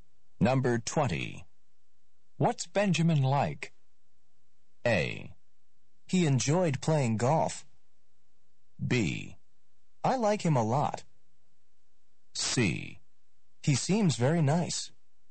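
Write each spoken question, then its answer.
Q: What's Benjamin like?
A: C: He seems very nice.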